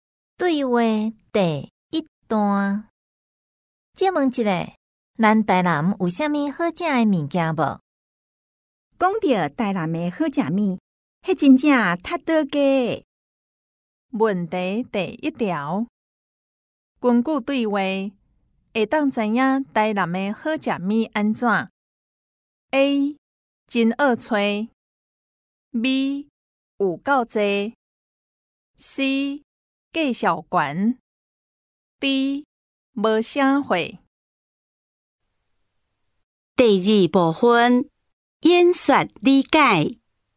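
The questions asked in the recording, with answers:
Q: 根据对话,会当知影台南的好吃物安怎 ?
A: B: 有够多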